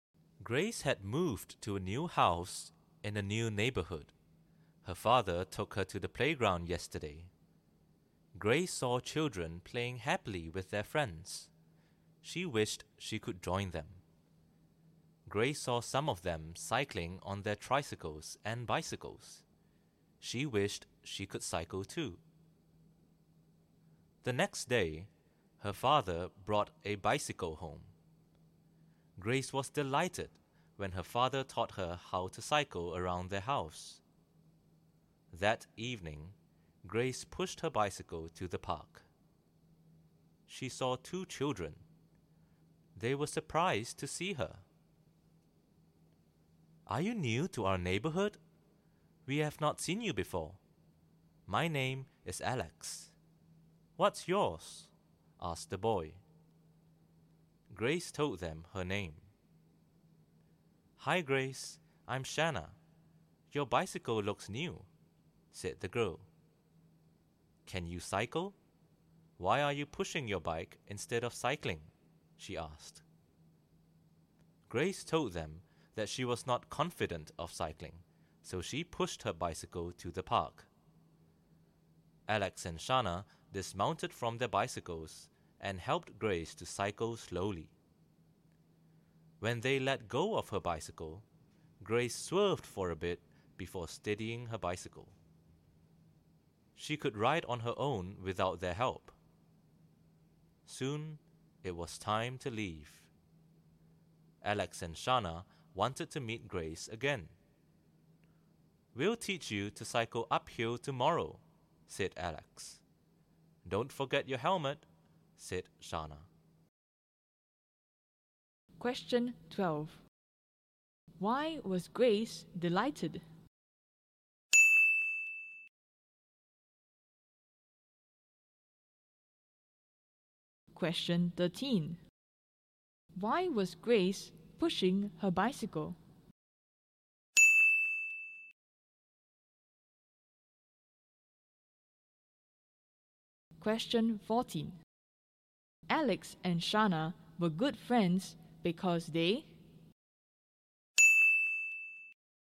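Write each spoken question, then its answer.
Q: Why was Grace delighted?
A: Her father taught her how to cycle around their house.

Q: Why was Grace pushing her bicycle?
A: She was not confident of cycling.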